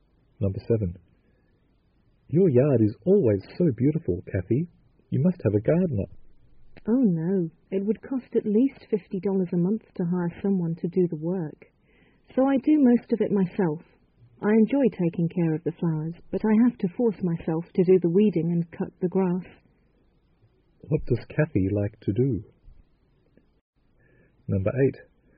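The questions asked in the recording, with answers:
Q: What does Kathy like to do?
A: Take care of the flowers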